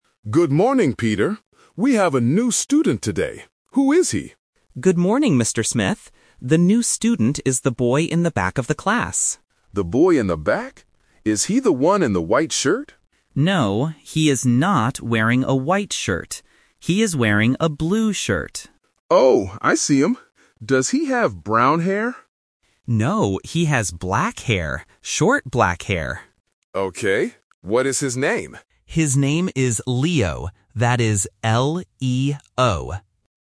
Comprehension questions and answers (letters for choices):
Listen to the conversation and choose the correct answer (A, B, or C).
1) What color is the new student's shirt?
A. Blue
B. White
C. Red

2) What kind of hair does the new student have?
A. Brown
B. Blond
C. Black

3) How do you spell his name?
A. L-I-O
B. L-E-O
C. L-E-O-N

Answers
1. A
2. C
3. B

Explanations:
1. The student clearly says, "He is wearing a blue shirt." Why the trap is wrong: Option (B) White is a trap. The teacher asks about the "white shirt", but the student says "No". Option (C) Red is a common color but is not mentioned in the audio.
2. The student describes the boy's hair by saying, "he has black hair." Why the trap is wrong: Option (A) Brown is a trap because the teacher asks "Does he have brown hair?", and the student rejects it with a "No". Option (B) Blond is not mentioned at all.
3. The student spells the name out loud: "That is L-E-O." Why the trap is wrong: Option (A) L-I-O is a phonetic trap because the English letter "E" sounds like the Vietnamese letter "I", which often confuses A1 learners. Option (C) L-E-O-N is a plausible name but has an extra letter "N".

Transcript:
Teacher: Good morning, Peter. We have a new student today. Who is he?
Student: Good morning, Mr. Smith. The new student is the boy in the back of the class.
Teacher: The boy in the back? Is he the one in the white shirt?
Student: No, he is not wearing a white shirt. He is wearing a blue shirt.
Teacher: Oh, I see him. Does he have brown hair?
Student: No, he has black hair. Short, black hair.
Teacher: Okay. What is his name?
Student: His name is Leo. That is L-E-O.